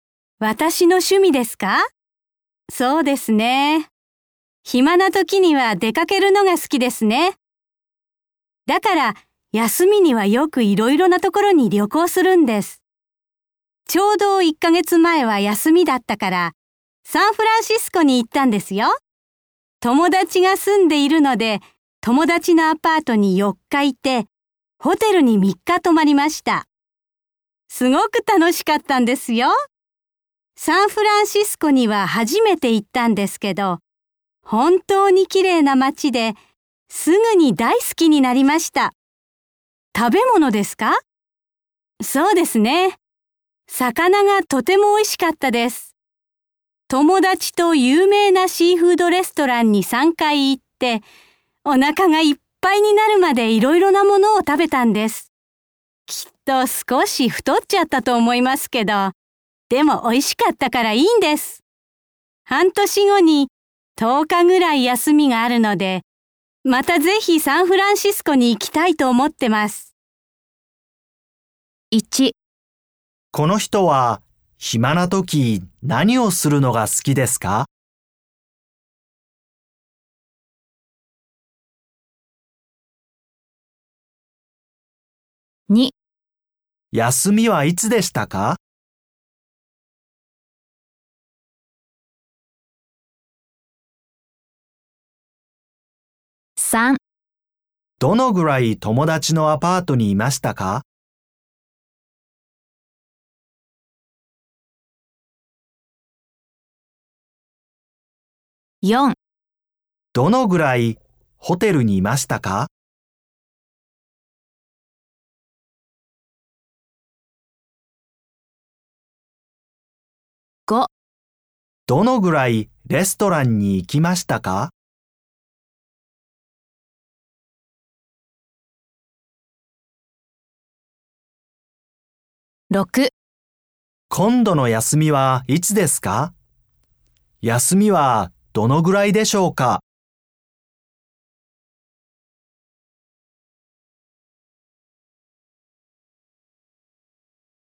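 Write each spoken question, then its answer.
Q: この人は暇な時何をするのが好きですか?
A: 出かけること(旅行)

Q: 休みはいつでしたか?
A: 1ヶ月前

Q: どのぐらい友達のアパートにいましたか?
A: 4日

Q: どのぐらいホテルにいましたか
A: 3日

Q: どのぐらいレストランに行きましたか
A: 3回

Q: 今度の休みはいつですか休みはどのぐらいでしょうか?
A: 半年後、10日ぐらい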